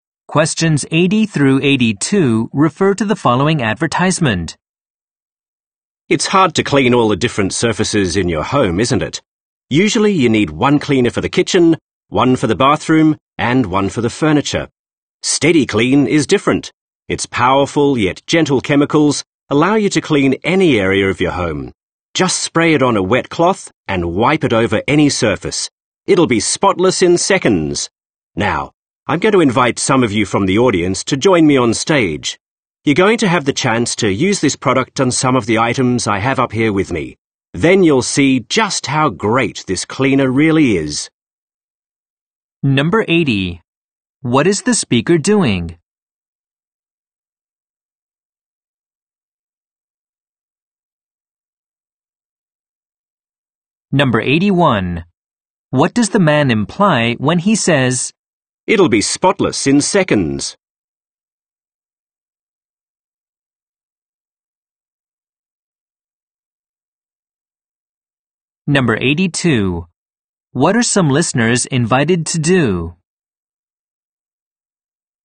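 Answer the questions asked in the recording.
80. Advertising a cleaning product (SteadyClean) to an audience
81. The product cleans very quickly
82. Come on stage and try the product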